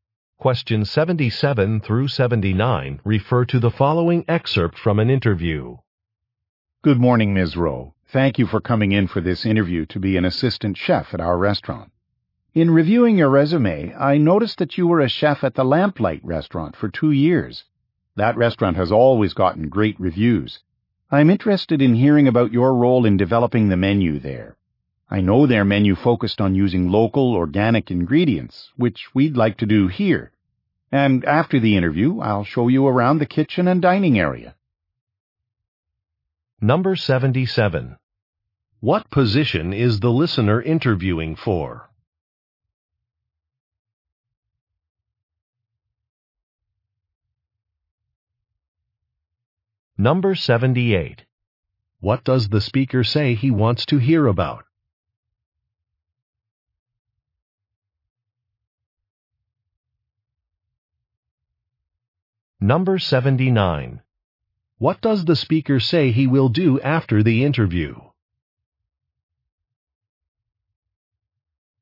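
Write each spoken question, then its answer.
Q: What position is the listener interviewing for?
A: Assistant chef

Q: What does the speaker say he wants to hear about?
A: Her role in developing the menu

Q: What does the speaker say he will do after the interview?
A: Show her around the kitchen and dining area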